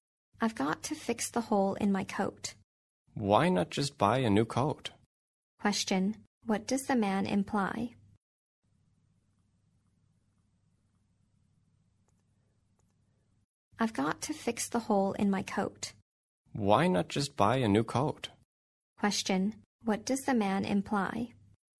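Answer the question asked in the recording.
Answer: The woman should buy a new coat instead of fixing the old one.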